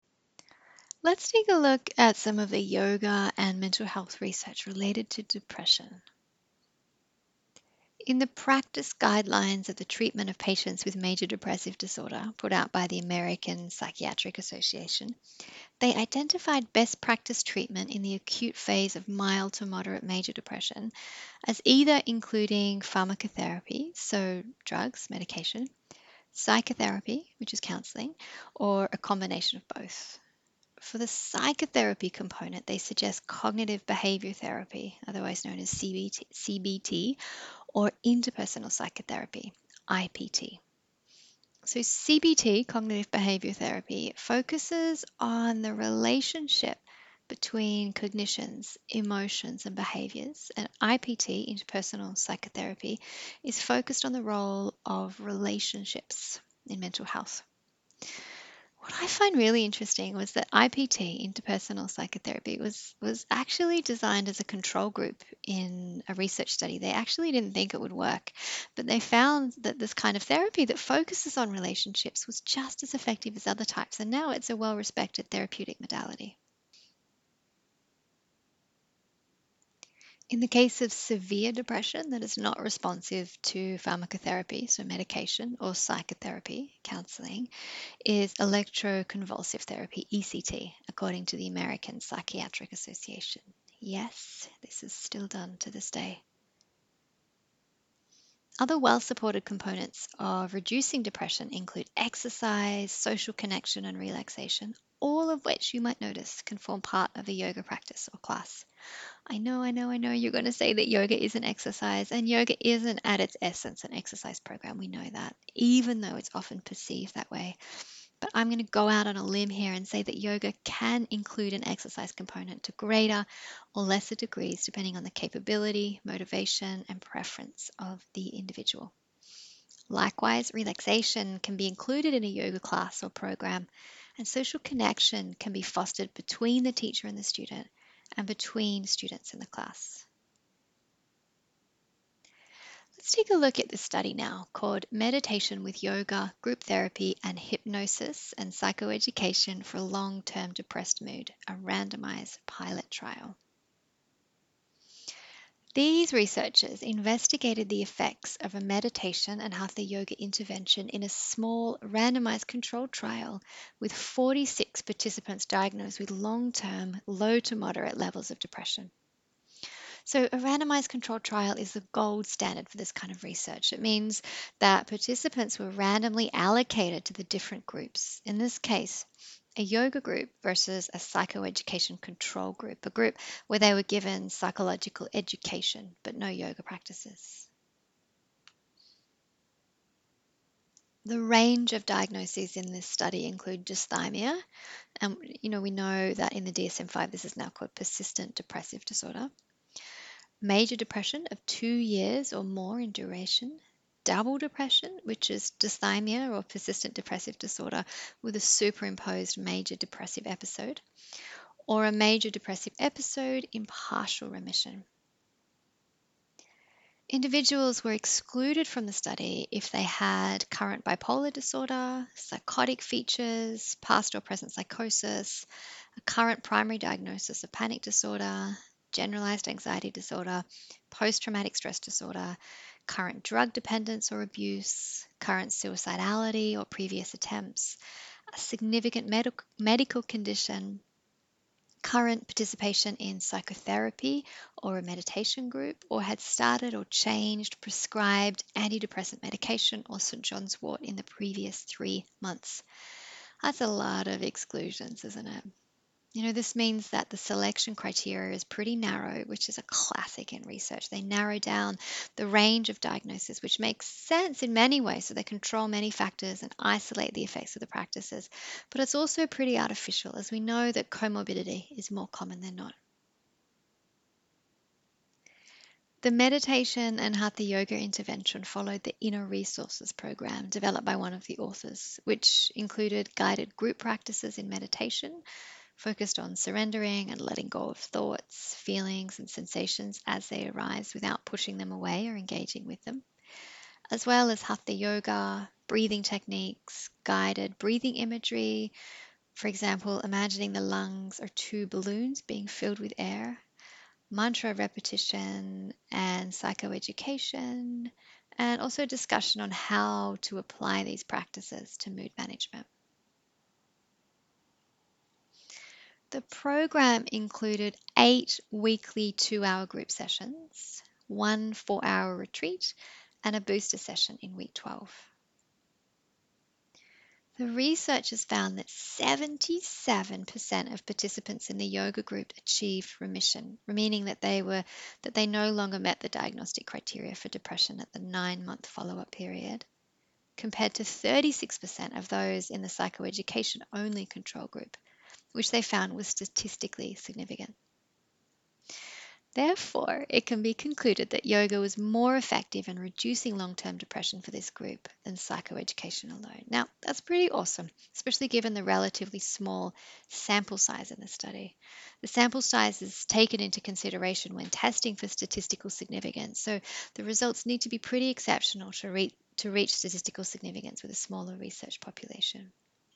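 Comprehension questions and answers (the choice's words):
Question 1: What does the American Psychiatric Association recommend for treatment in the acute phase of mild to moderate Major Depression?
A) Pharmacotherapy, psychotherapy (including Cognitive Behaviour Therapy or Interpersonal Psychotherapy), or a combination of both.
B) Electroconvulsive Therapy.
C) Yoga.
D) None of the above.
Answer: Pharmacotherapy, psychotherapy (including Cognitive Behaviour Therapy or Interpersonal Psychotherapy), or a combination of both.

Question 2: What were the results of the study on yoga for long-term depression by Butler, Waelde and colleagues?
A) 77% of the participants in the yoga group achieved remission.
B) 36% of the participants in the psychoeducation group achieved remission.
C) There was a statistically significant difference between participants who were randomly allocated to the yoga group as compared to those who were randomly allocated to the psychoeducation only group, and therefore it can be concluded that yoga was more effective in reducing long term depression for this group than psychoeducation alone.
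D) All of the above.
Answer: All of the above.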